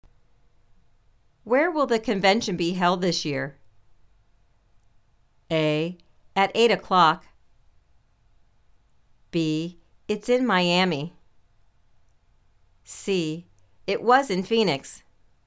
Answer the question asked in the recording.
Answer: It's in Miami.